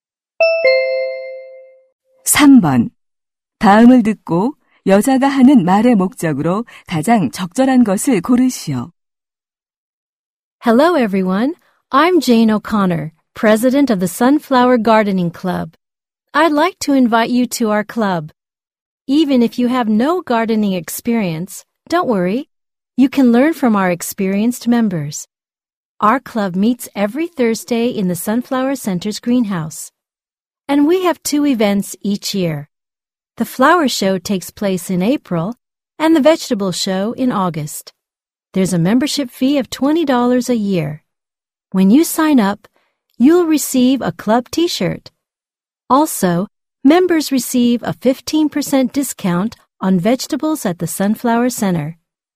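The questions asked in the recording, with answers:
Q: 다음을 듣고 여자가 하는 말의 목적으로 가장 적절한 것을 고르시오.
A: 원예 동아리 가입을 권유하려고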